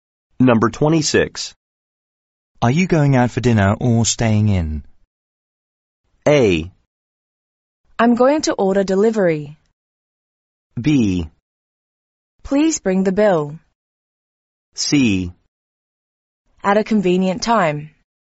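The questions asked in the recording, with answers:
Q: Are you going out for dinner or staying in?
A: A: I'm going to order delivery.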